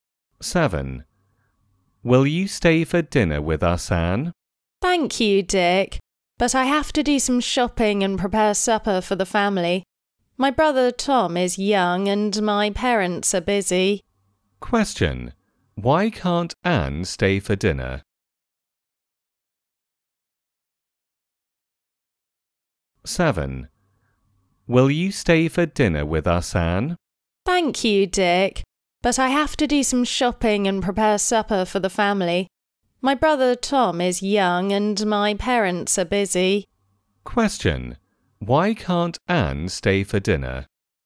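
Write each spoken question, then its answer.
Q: Why can't Anne stay for dinner?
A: She has to do some shopping and prepare supper for her family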